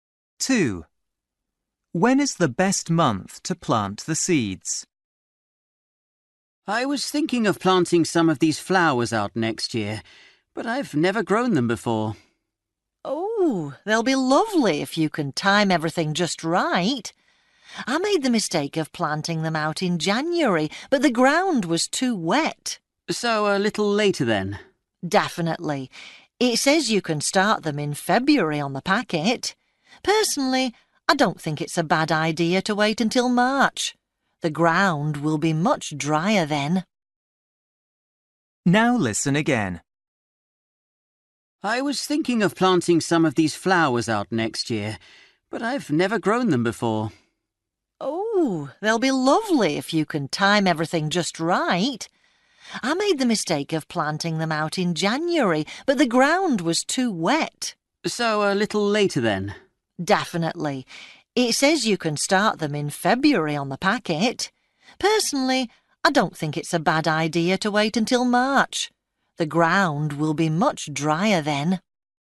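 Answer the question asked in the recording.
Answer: March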